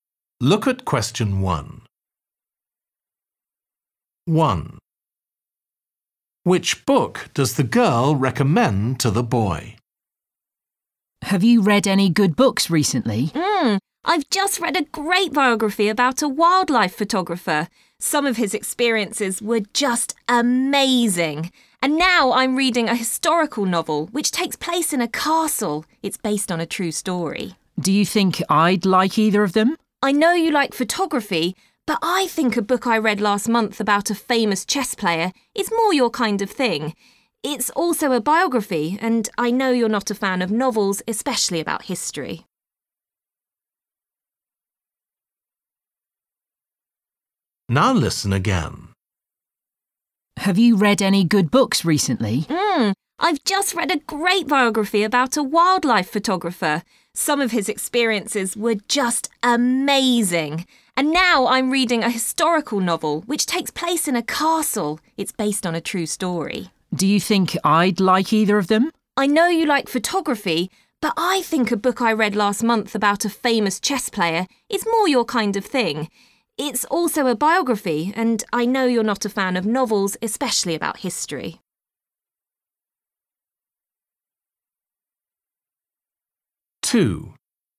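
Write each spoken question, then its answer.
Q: Which book does the girl recommend to the boy?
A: a biography about a famous chess player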